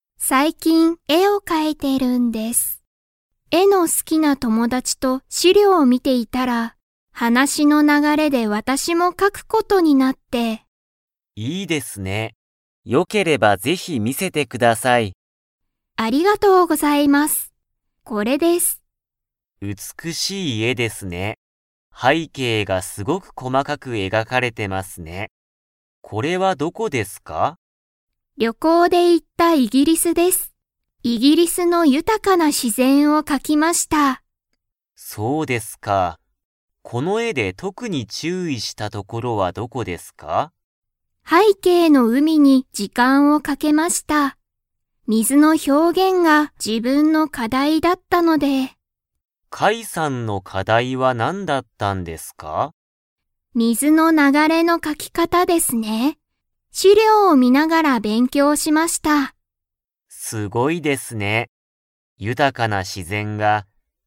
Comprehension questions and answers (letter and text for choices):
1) カイさんは、何なんの絵えを描かきましたか?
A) 注意ちゅうい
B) 自然しぜん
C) 建物たてもの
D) 資料しりょう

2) カイさんは、水みずの描かき方かたを 。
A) 勉強べんきょうした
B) 勉強べんきょうしなかった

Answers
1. B) 自然しぜん
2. A) 勉強べんきょうした

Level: Level 4